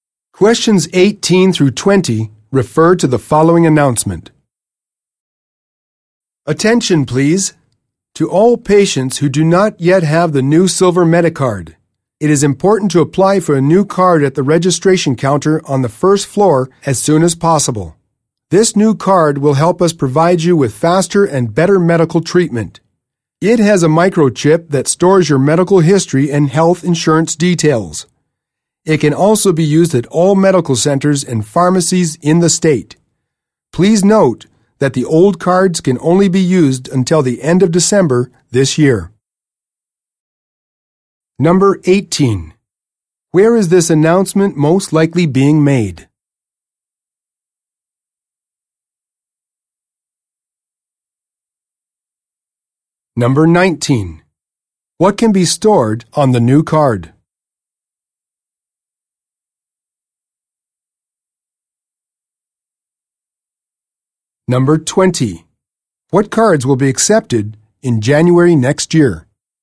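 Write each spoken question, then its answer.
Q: Where is this announcement most likely being made?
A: In a hospital

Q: What can be stored on the new card?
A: Medical history and health insurance details

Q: What cards will be accepted in January next year?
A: Only the new Silver Medicard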